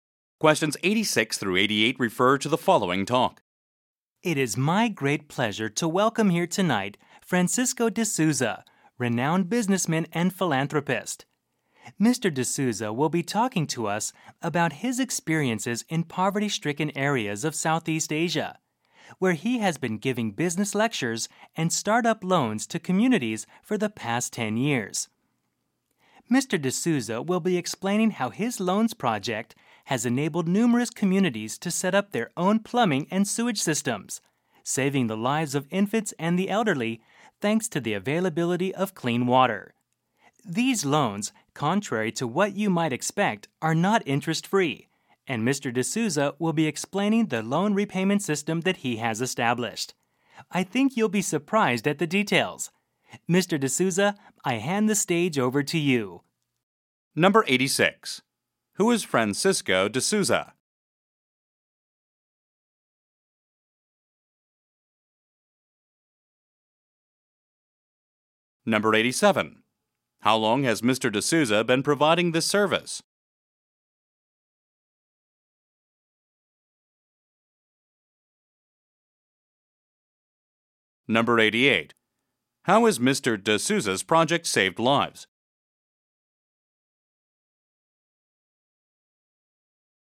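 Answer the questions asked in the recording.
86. A businessman and philanthropist
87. 10 years
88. By funding plumbing and sewage systems that provide clean water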